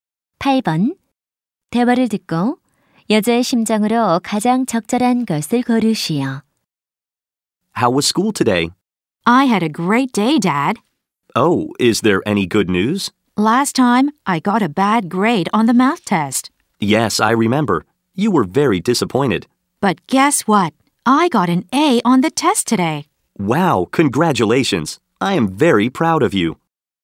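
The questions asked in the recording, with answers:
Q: 대화를 듣고 여자의 심정으로 가장 적절한 것을 고르시오.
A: 기쁨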